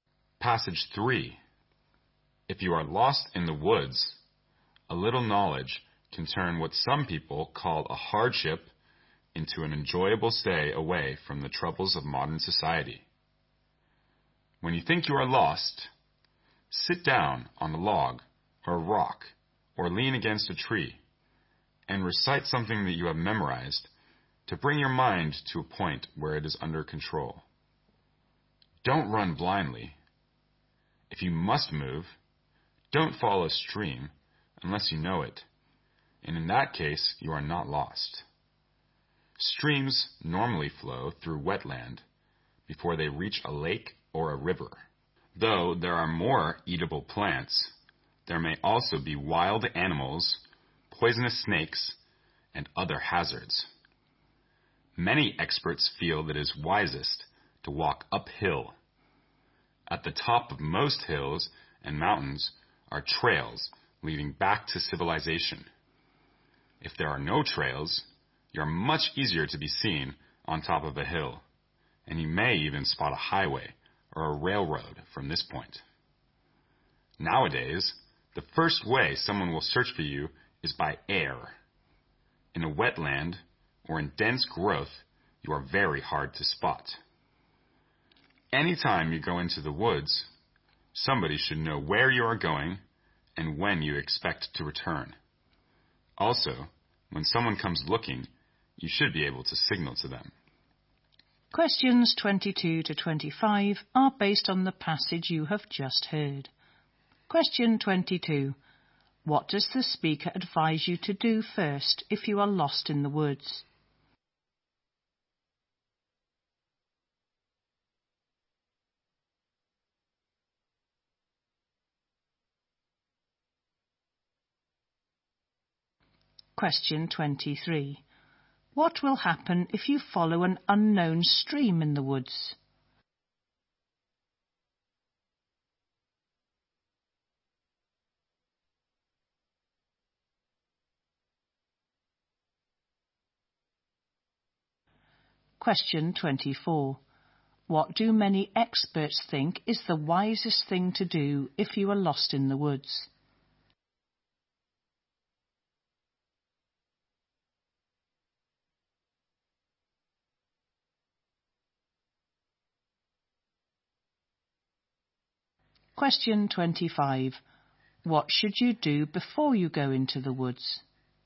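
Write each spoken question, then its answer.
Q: What does the speaker advise you to do first if you are lost in the woods?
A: Sit down and recite something memorized to get your mind under control

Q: What will happen if you follow an unknown stream in the woods?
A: You may end up in wetland with wild animals, poisonous snakes and other hazards

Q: What do many experts think is the wisest thing to do if you are lost in the woods?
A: Walk uphill

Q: What should you do before you go into the woods?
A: Let somebody know where you are going and when you expect to return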